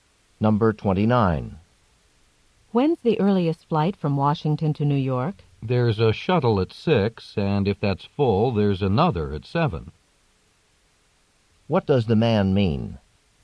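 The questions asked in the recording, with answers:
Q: What does the man mean?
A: The earliest flight is a shuttle at 6, with another at 7 if it's full.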